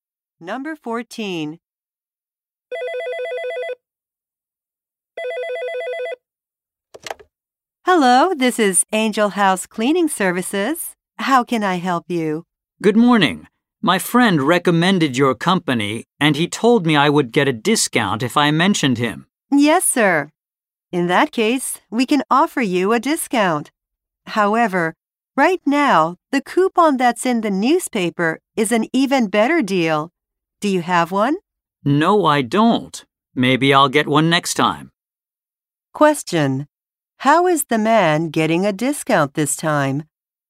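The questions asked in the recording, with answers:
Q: How is the man getting a discount this time?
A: By mentioning his friend who recommended the company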